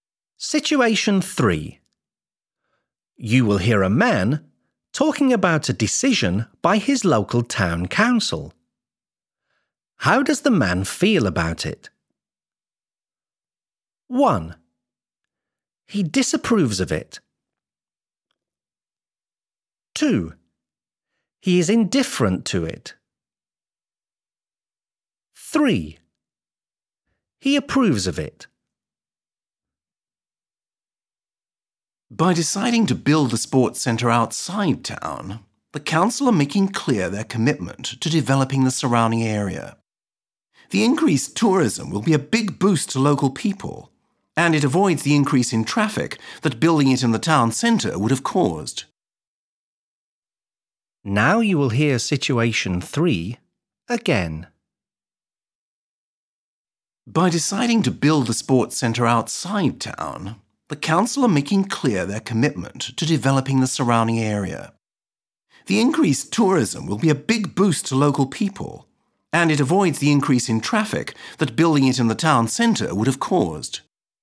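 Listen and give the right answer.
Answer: 3: He approves of it.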